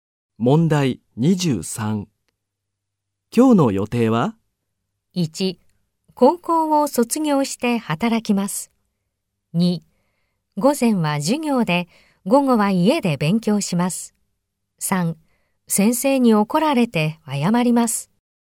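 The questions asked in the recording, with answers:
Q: 今日の予定は?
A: 2: 午前は授業で、午後は家で勉強します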